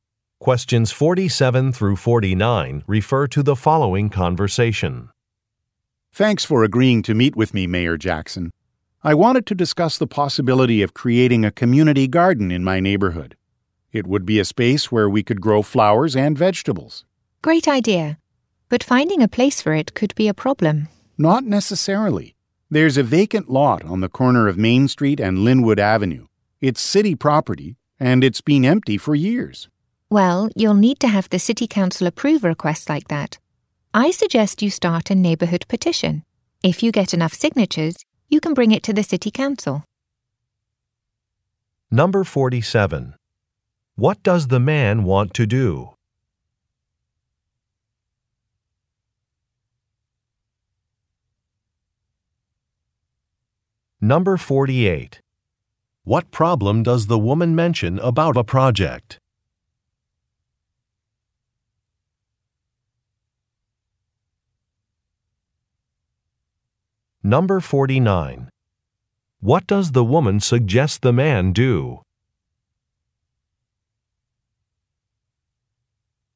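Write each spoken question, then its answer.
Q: What does the man want to do?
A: Create a community garden in his neighborhood

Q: What problem does the woman mention about a project?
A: Finding a place for it could be difficult

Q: What does the woman suggest the man do?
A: Start a neighborhood petition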